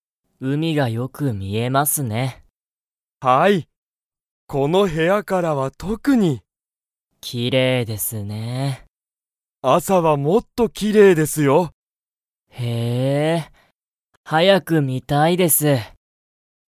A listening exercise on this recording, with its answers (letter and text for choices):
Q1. ____がよく見みえる。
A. 部屋へや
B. 写真しゃしん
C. 朝あさ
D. 海うみ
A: D. 海うみ

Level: Level 1